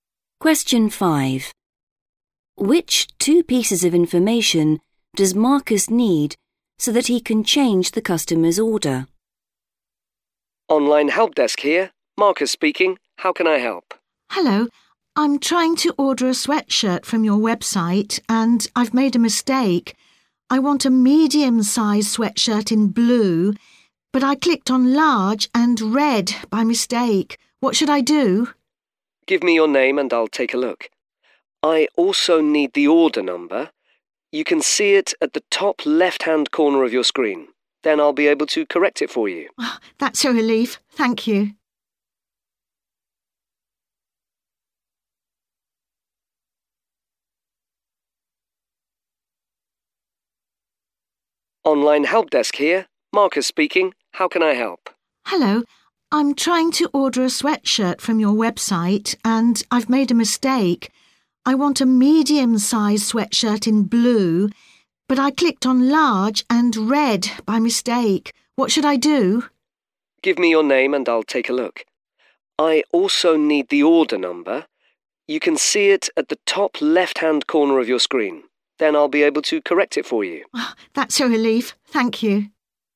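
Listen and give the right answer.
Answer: Her name and the order number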